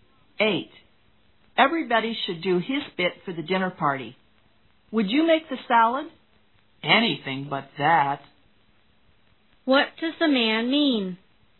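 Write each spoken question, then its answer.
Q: What does the man mean?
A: He doesn't want to make the salad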